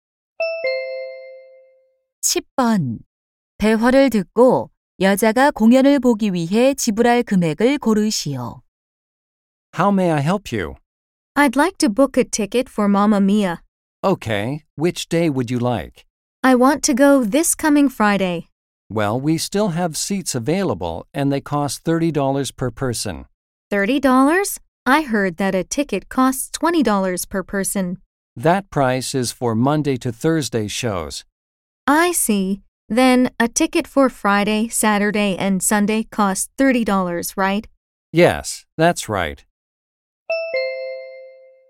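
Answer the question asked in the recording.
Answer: 30달러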